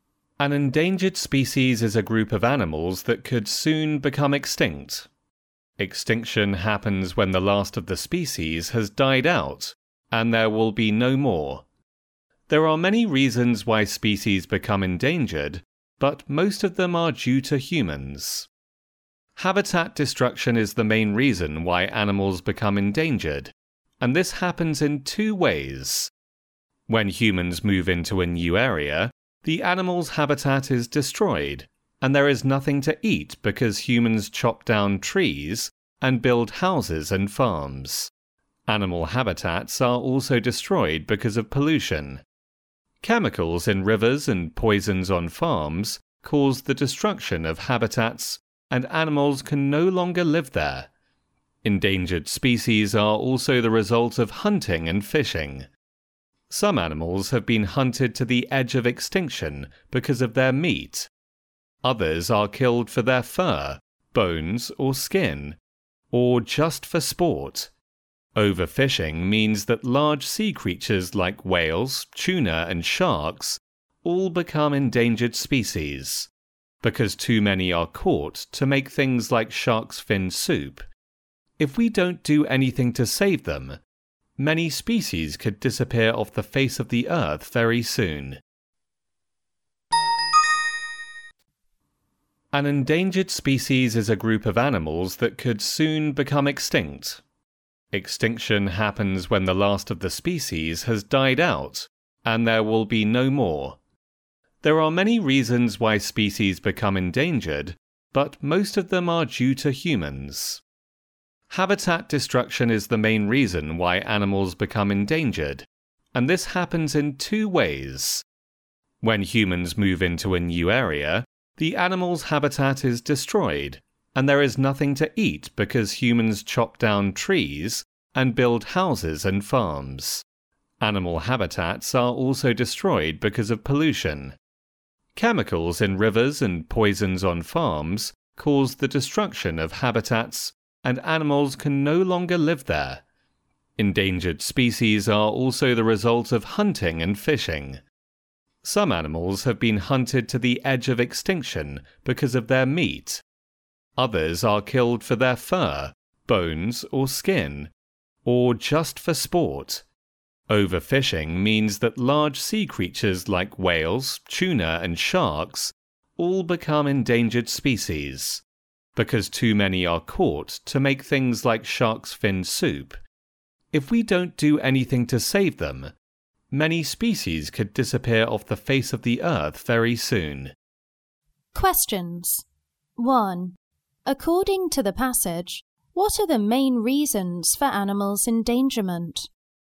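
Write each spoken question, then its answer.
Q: According to the passage, what are the main reasons for animals' endangerment?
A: Habitat destruction (humans moving in and pollution) and hunting and fishing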